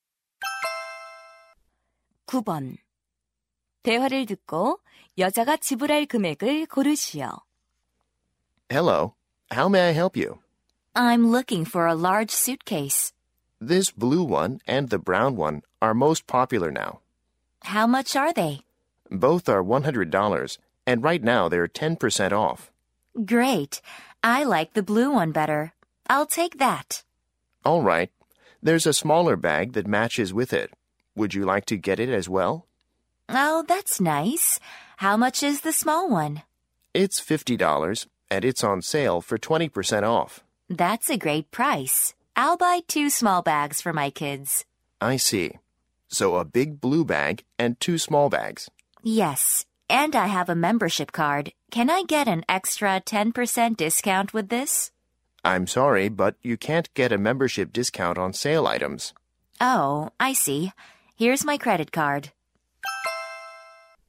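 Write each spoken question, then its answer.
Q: 대화를 듣고 여자가 지불할 금액을 고르시오.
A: 170달러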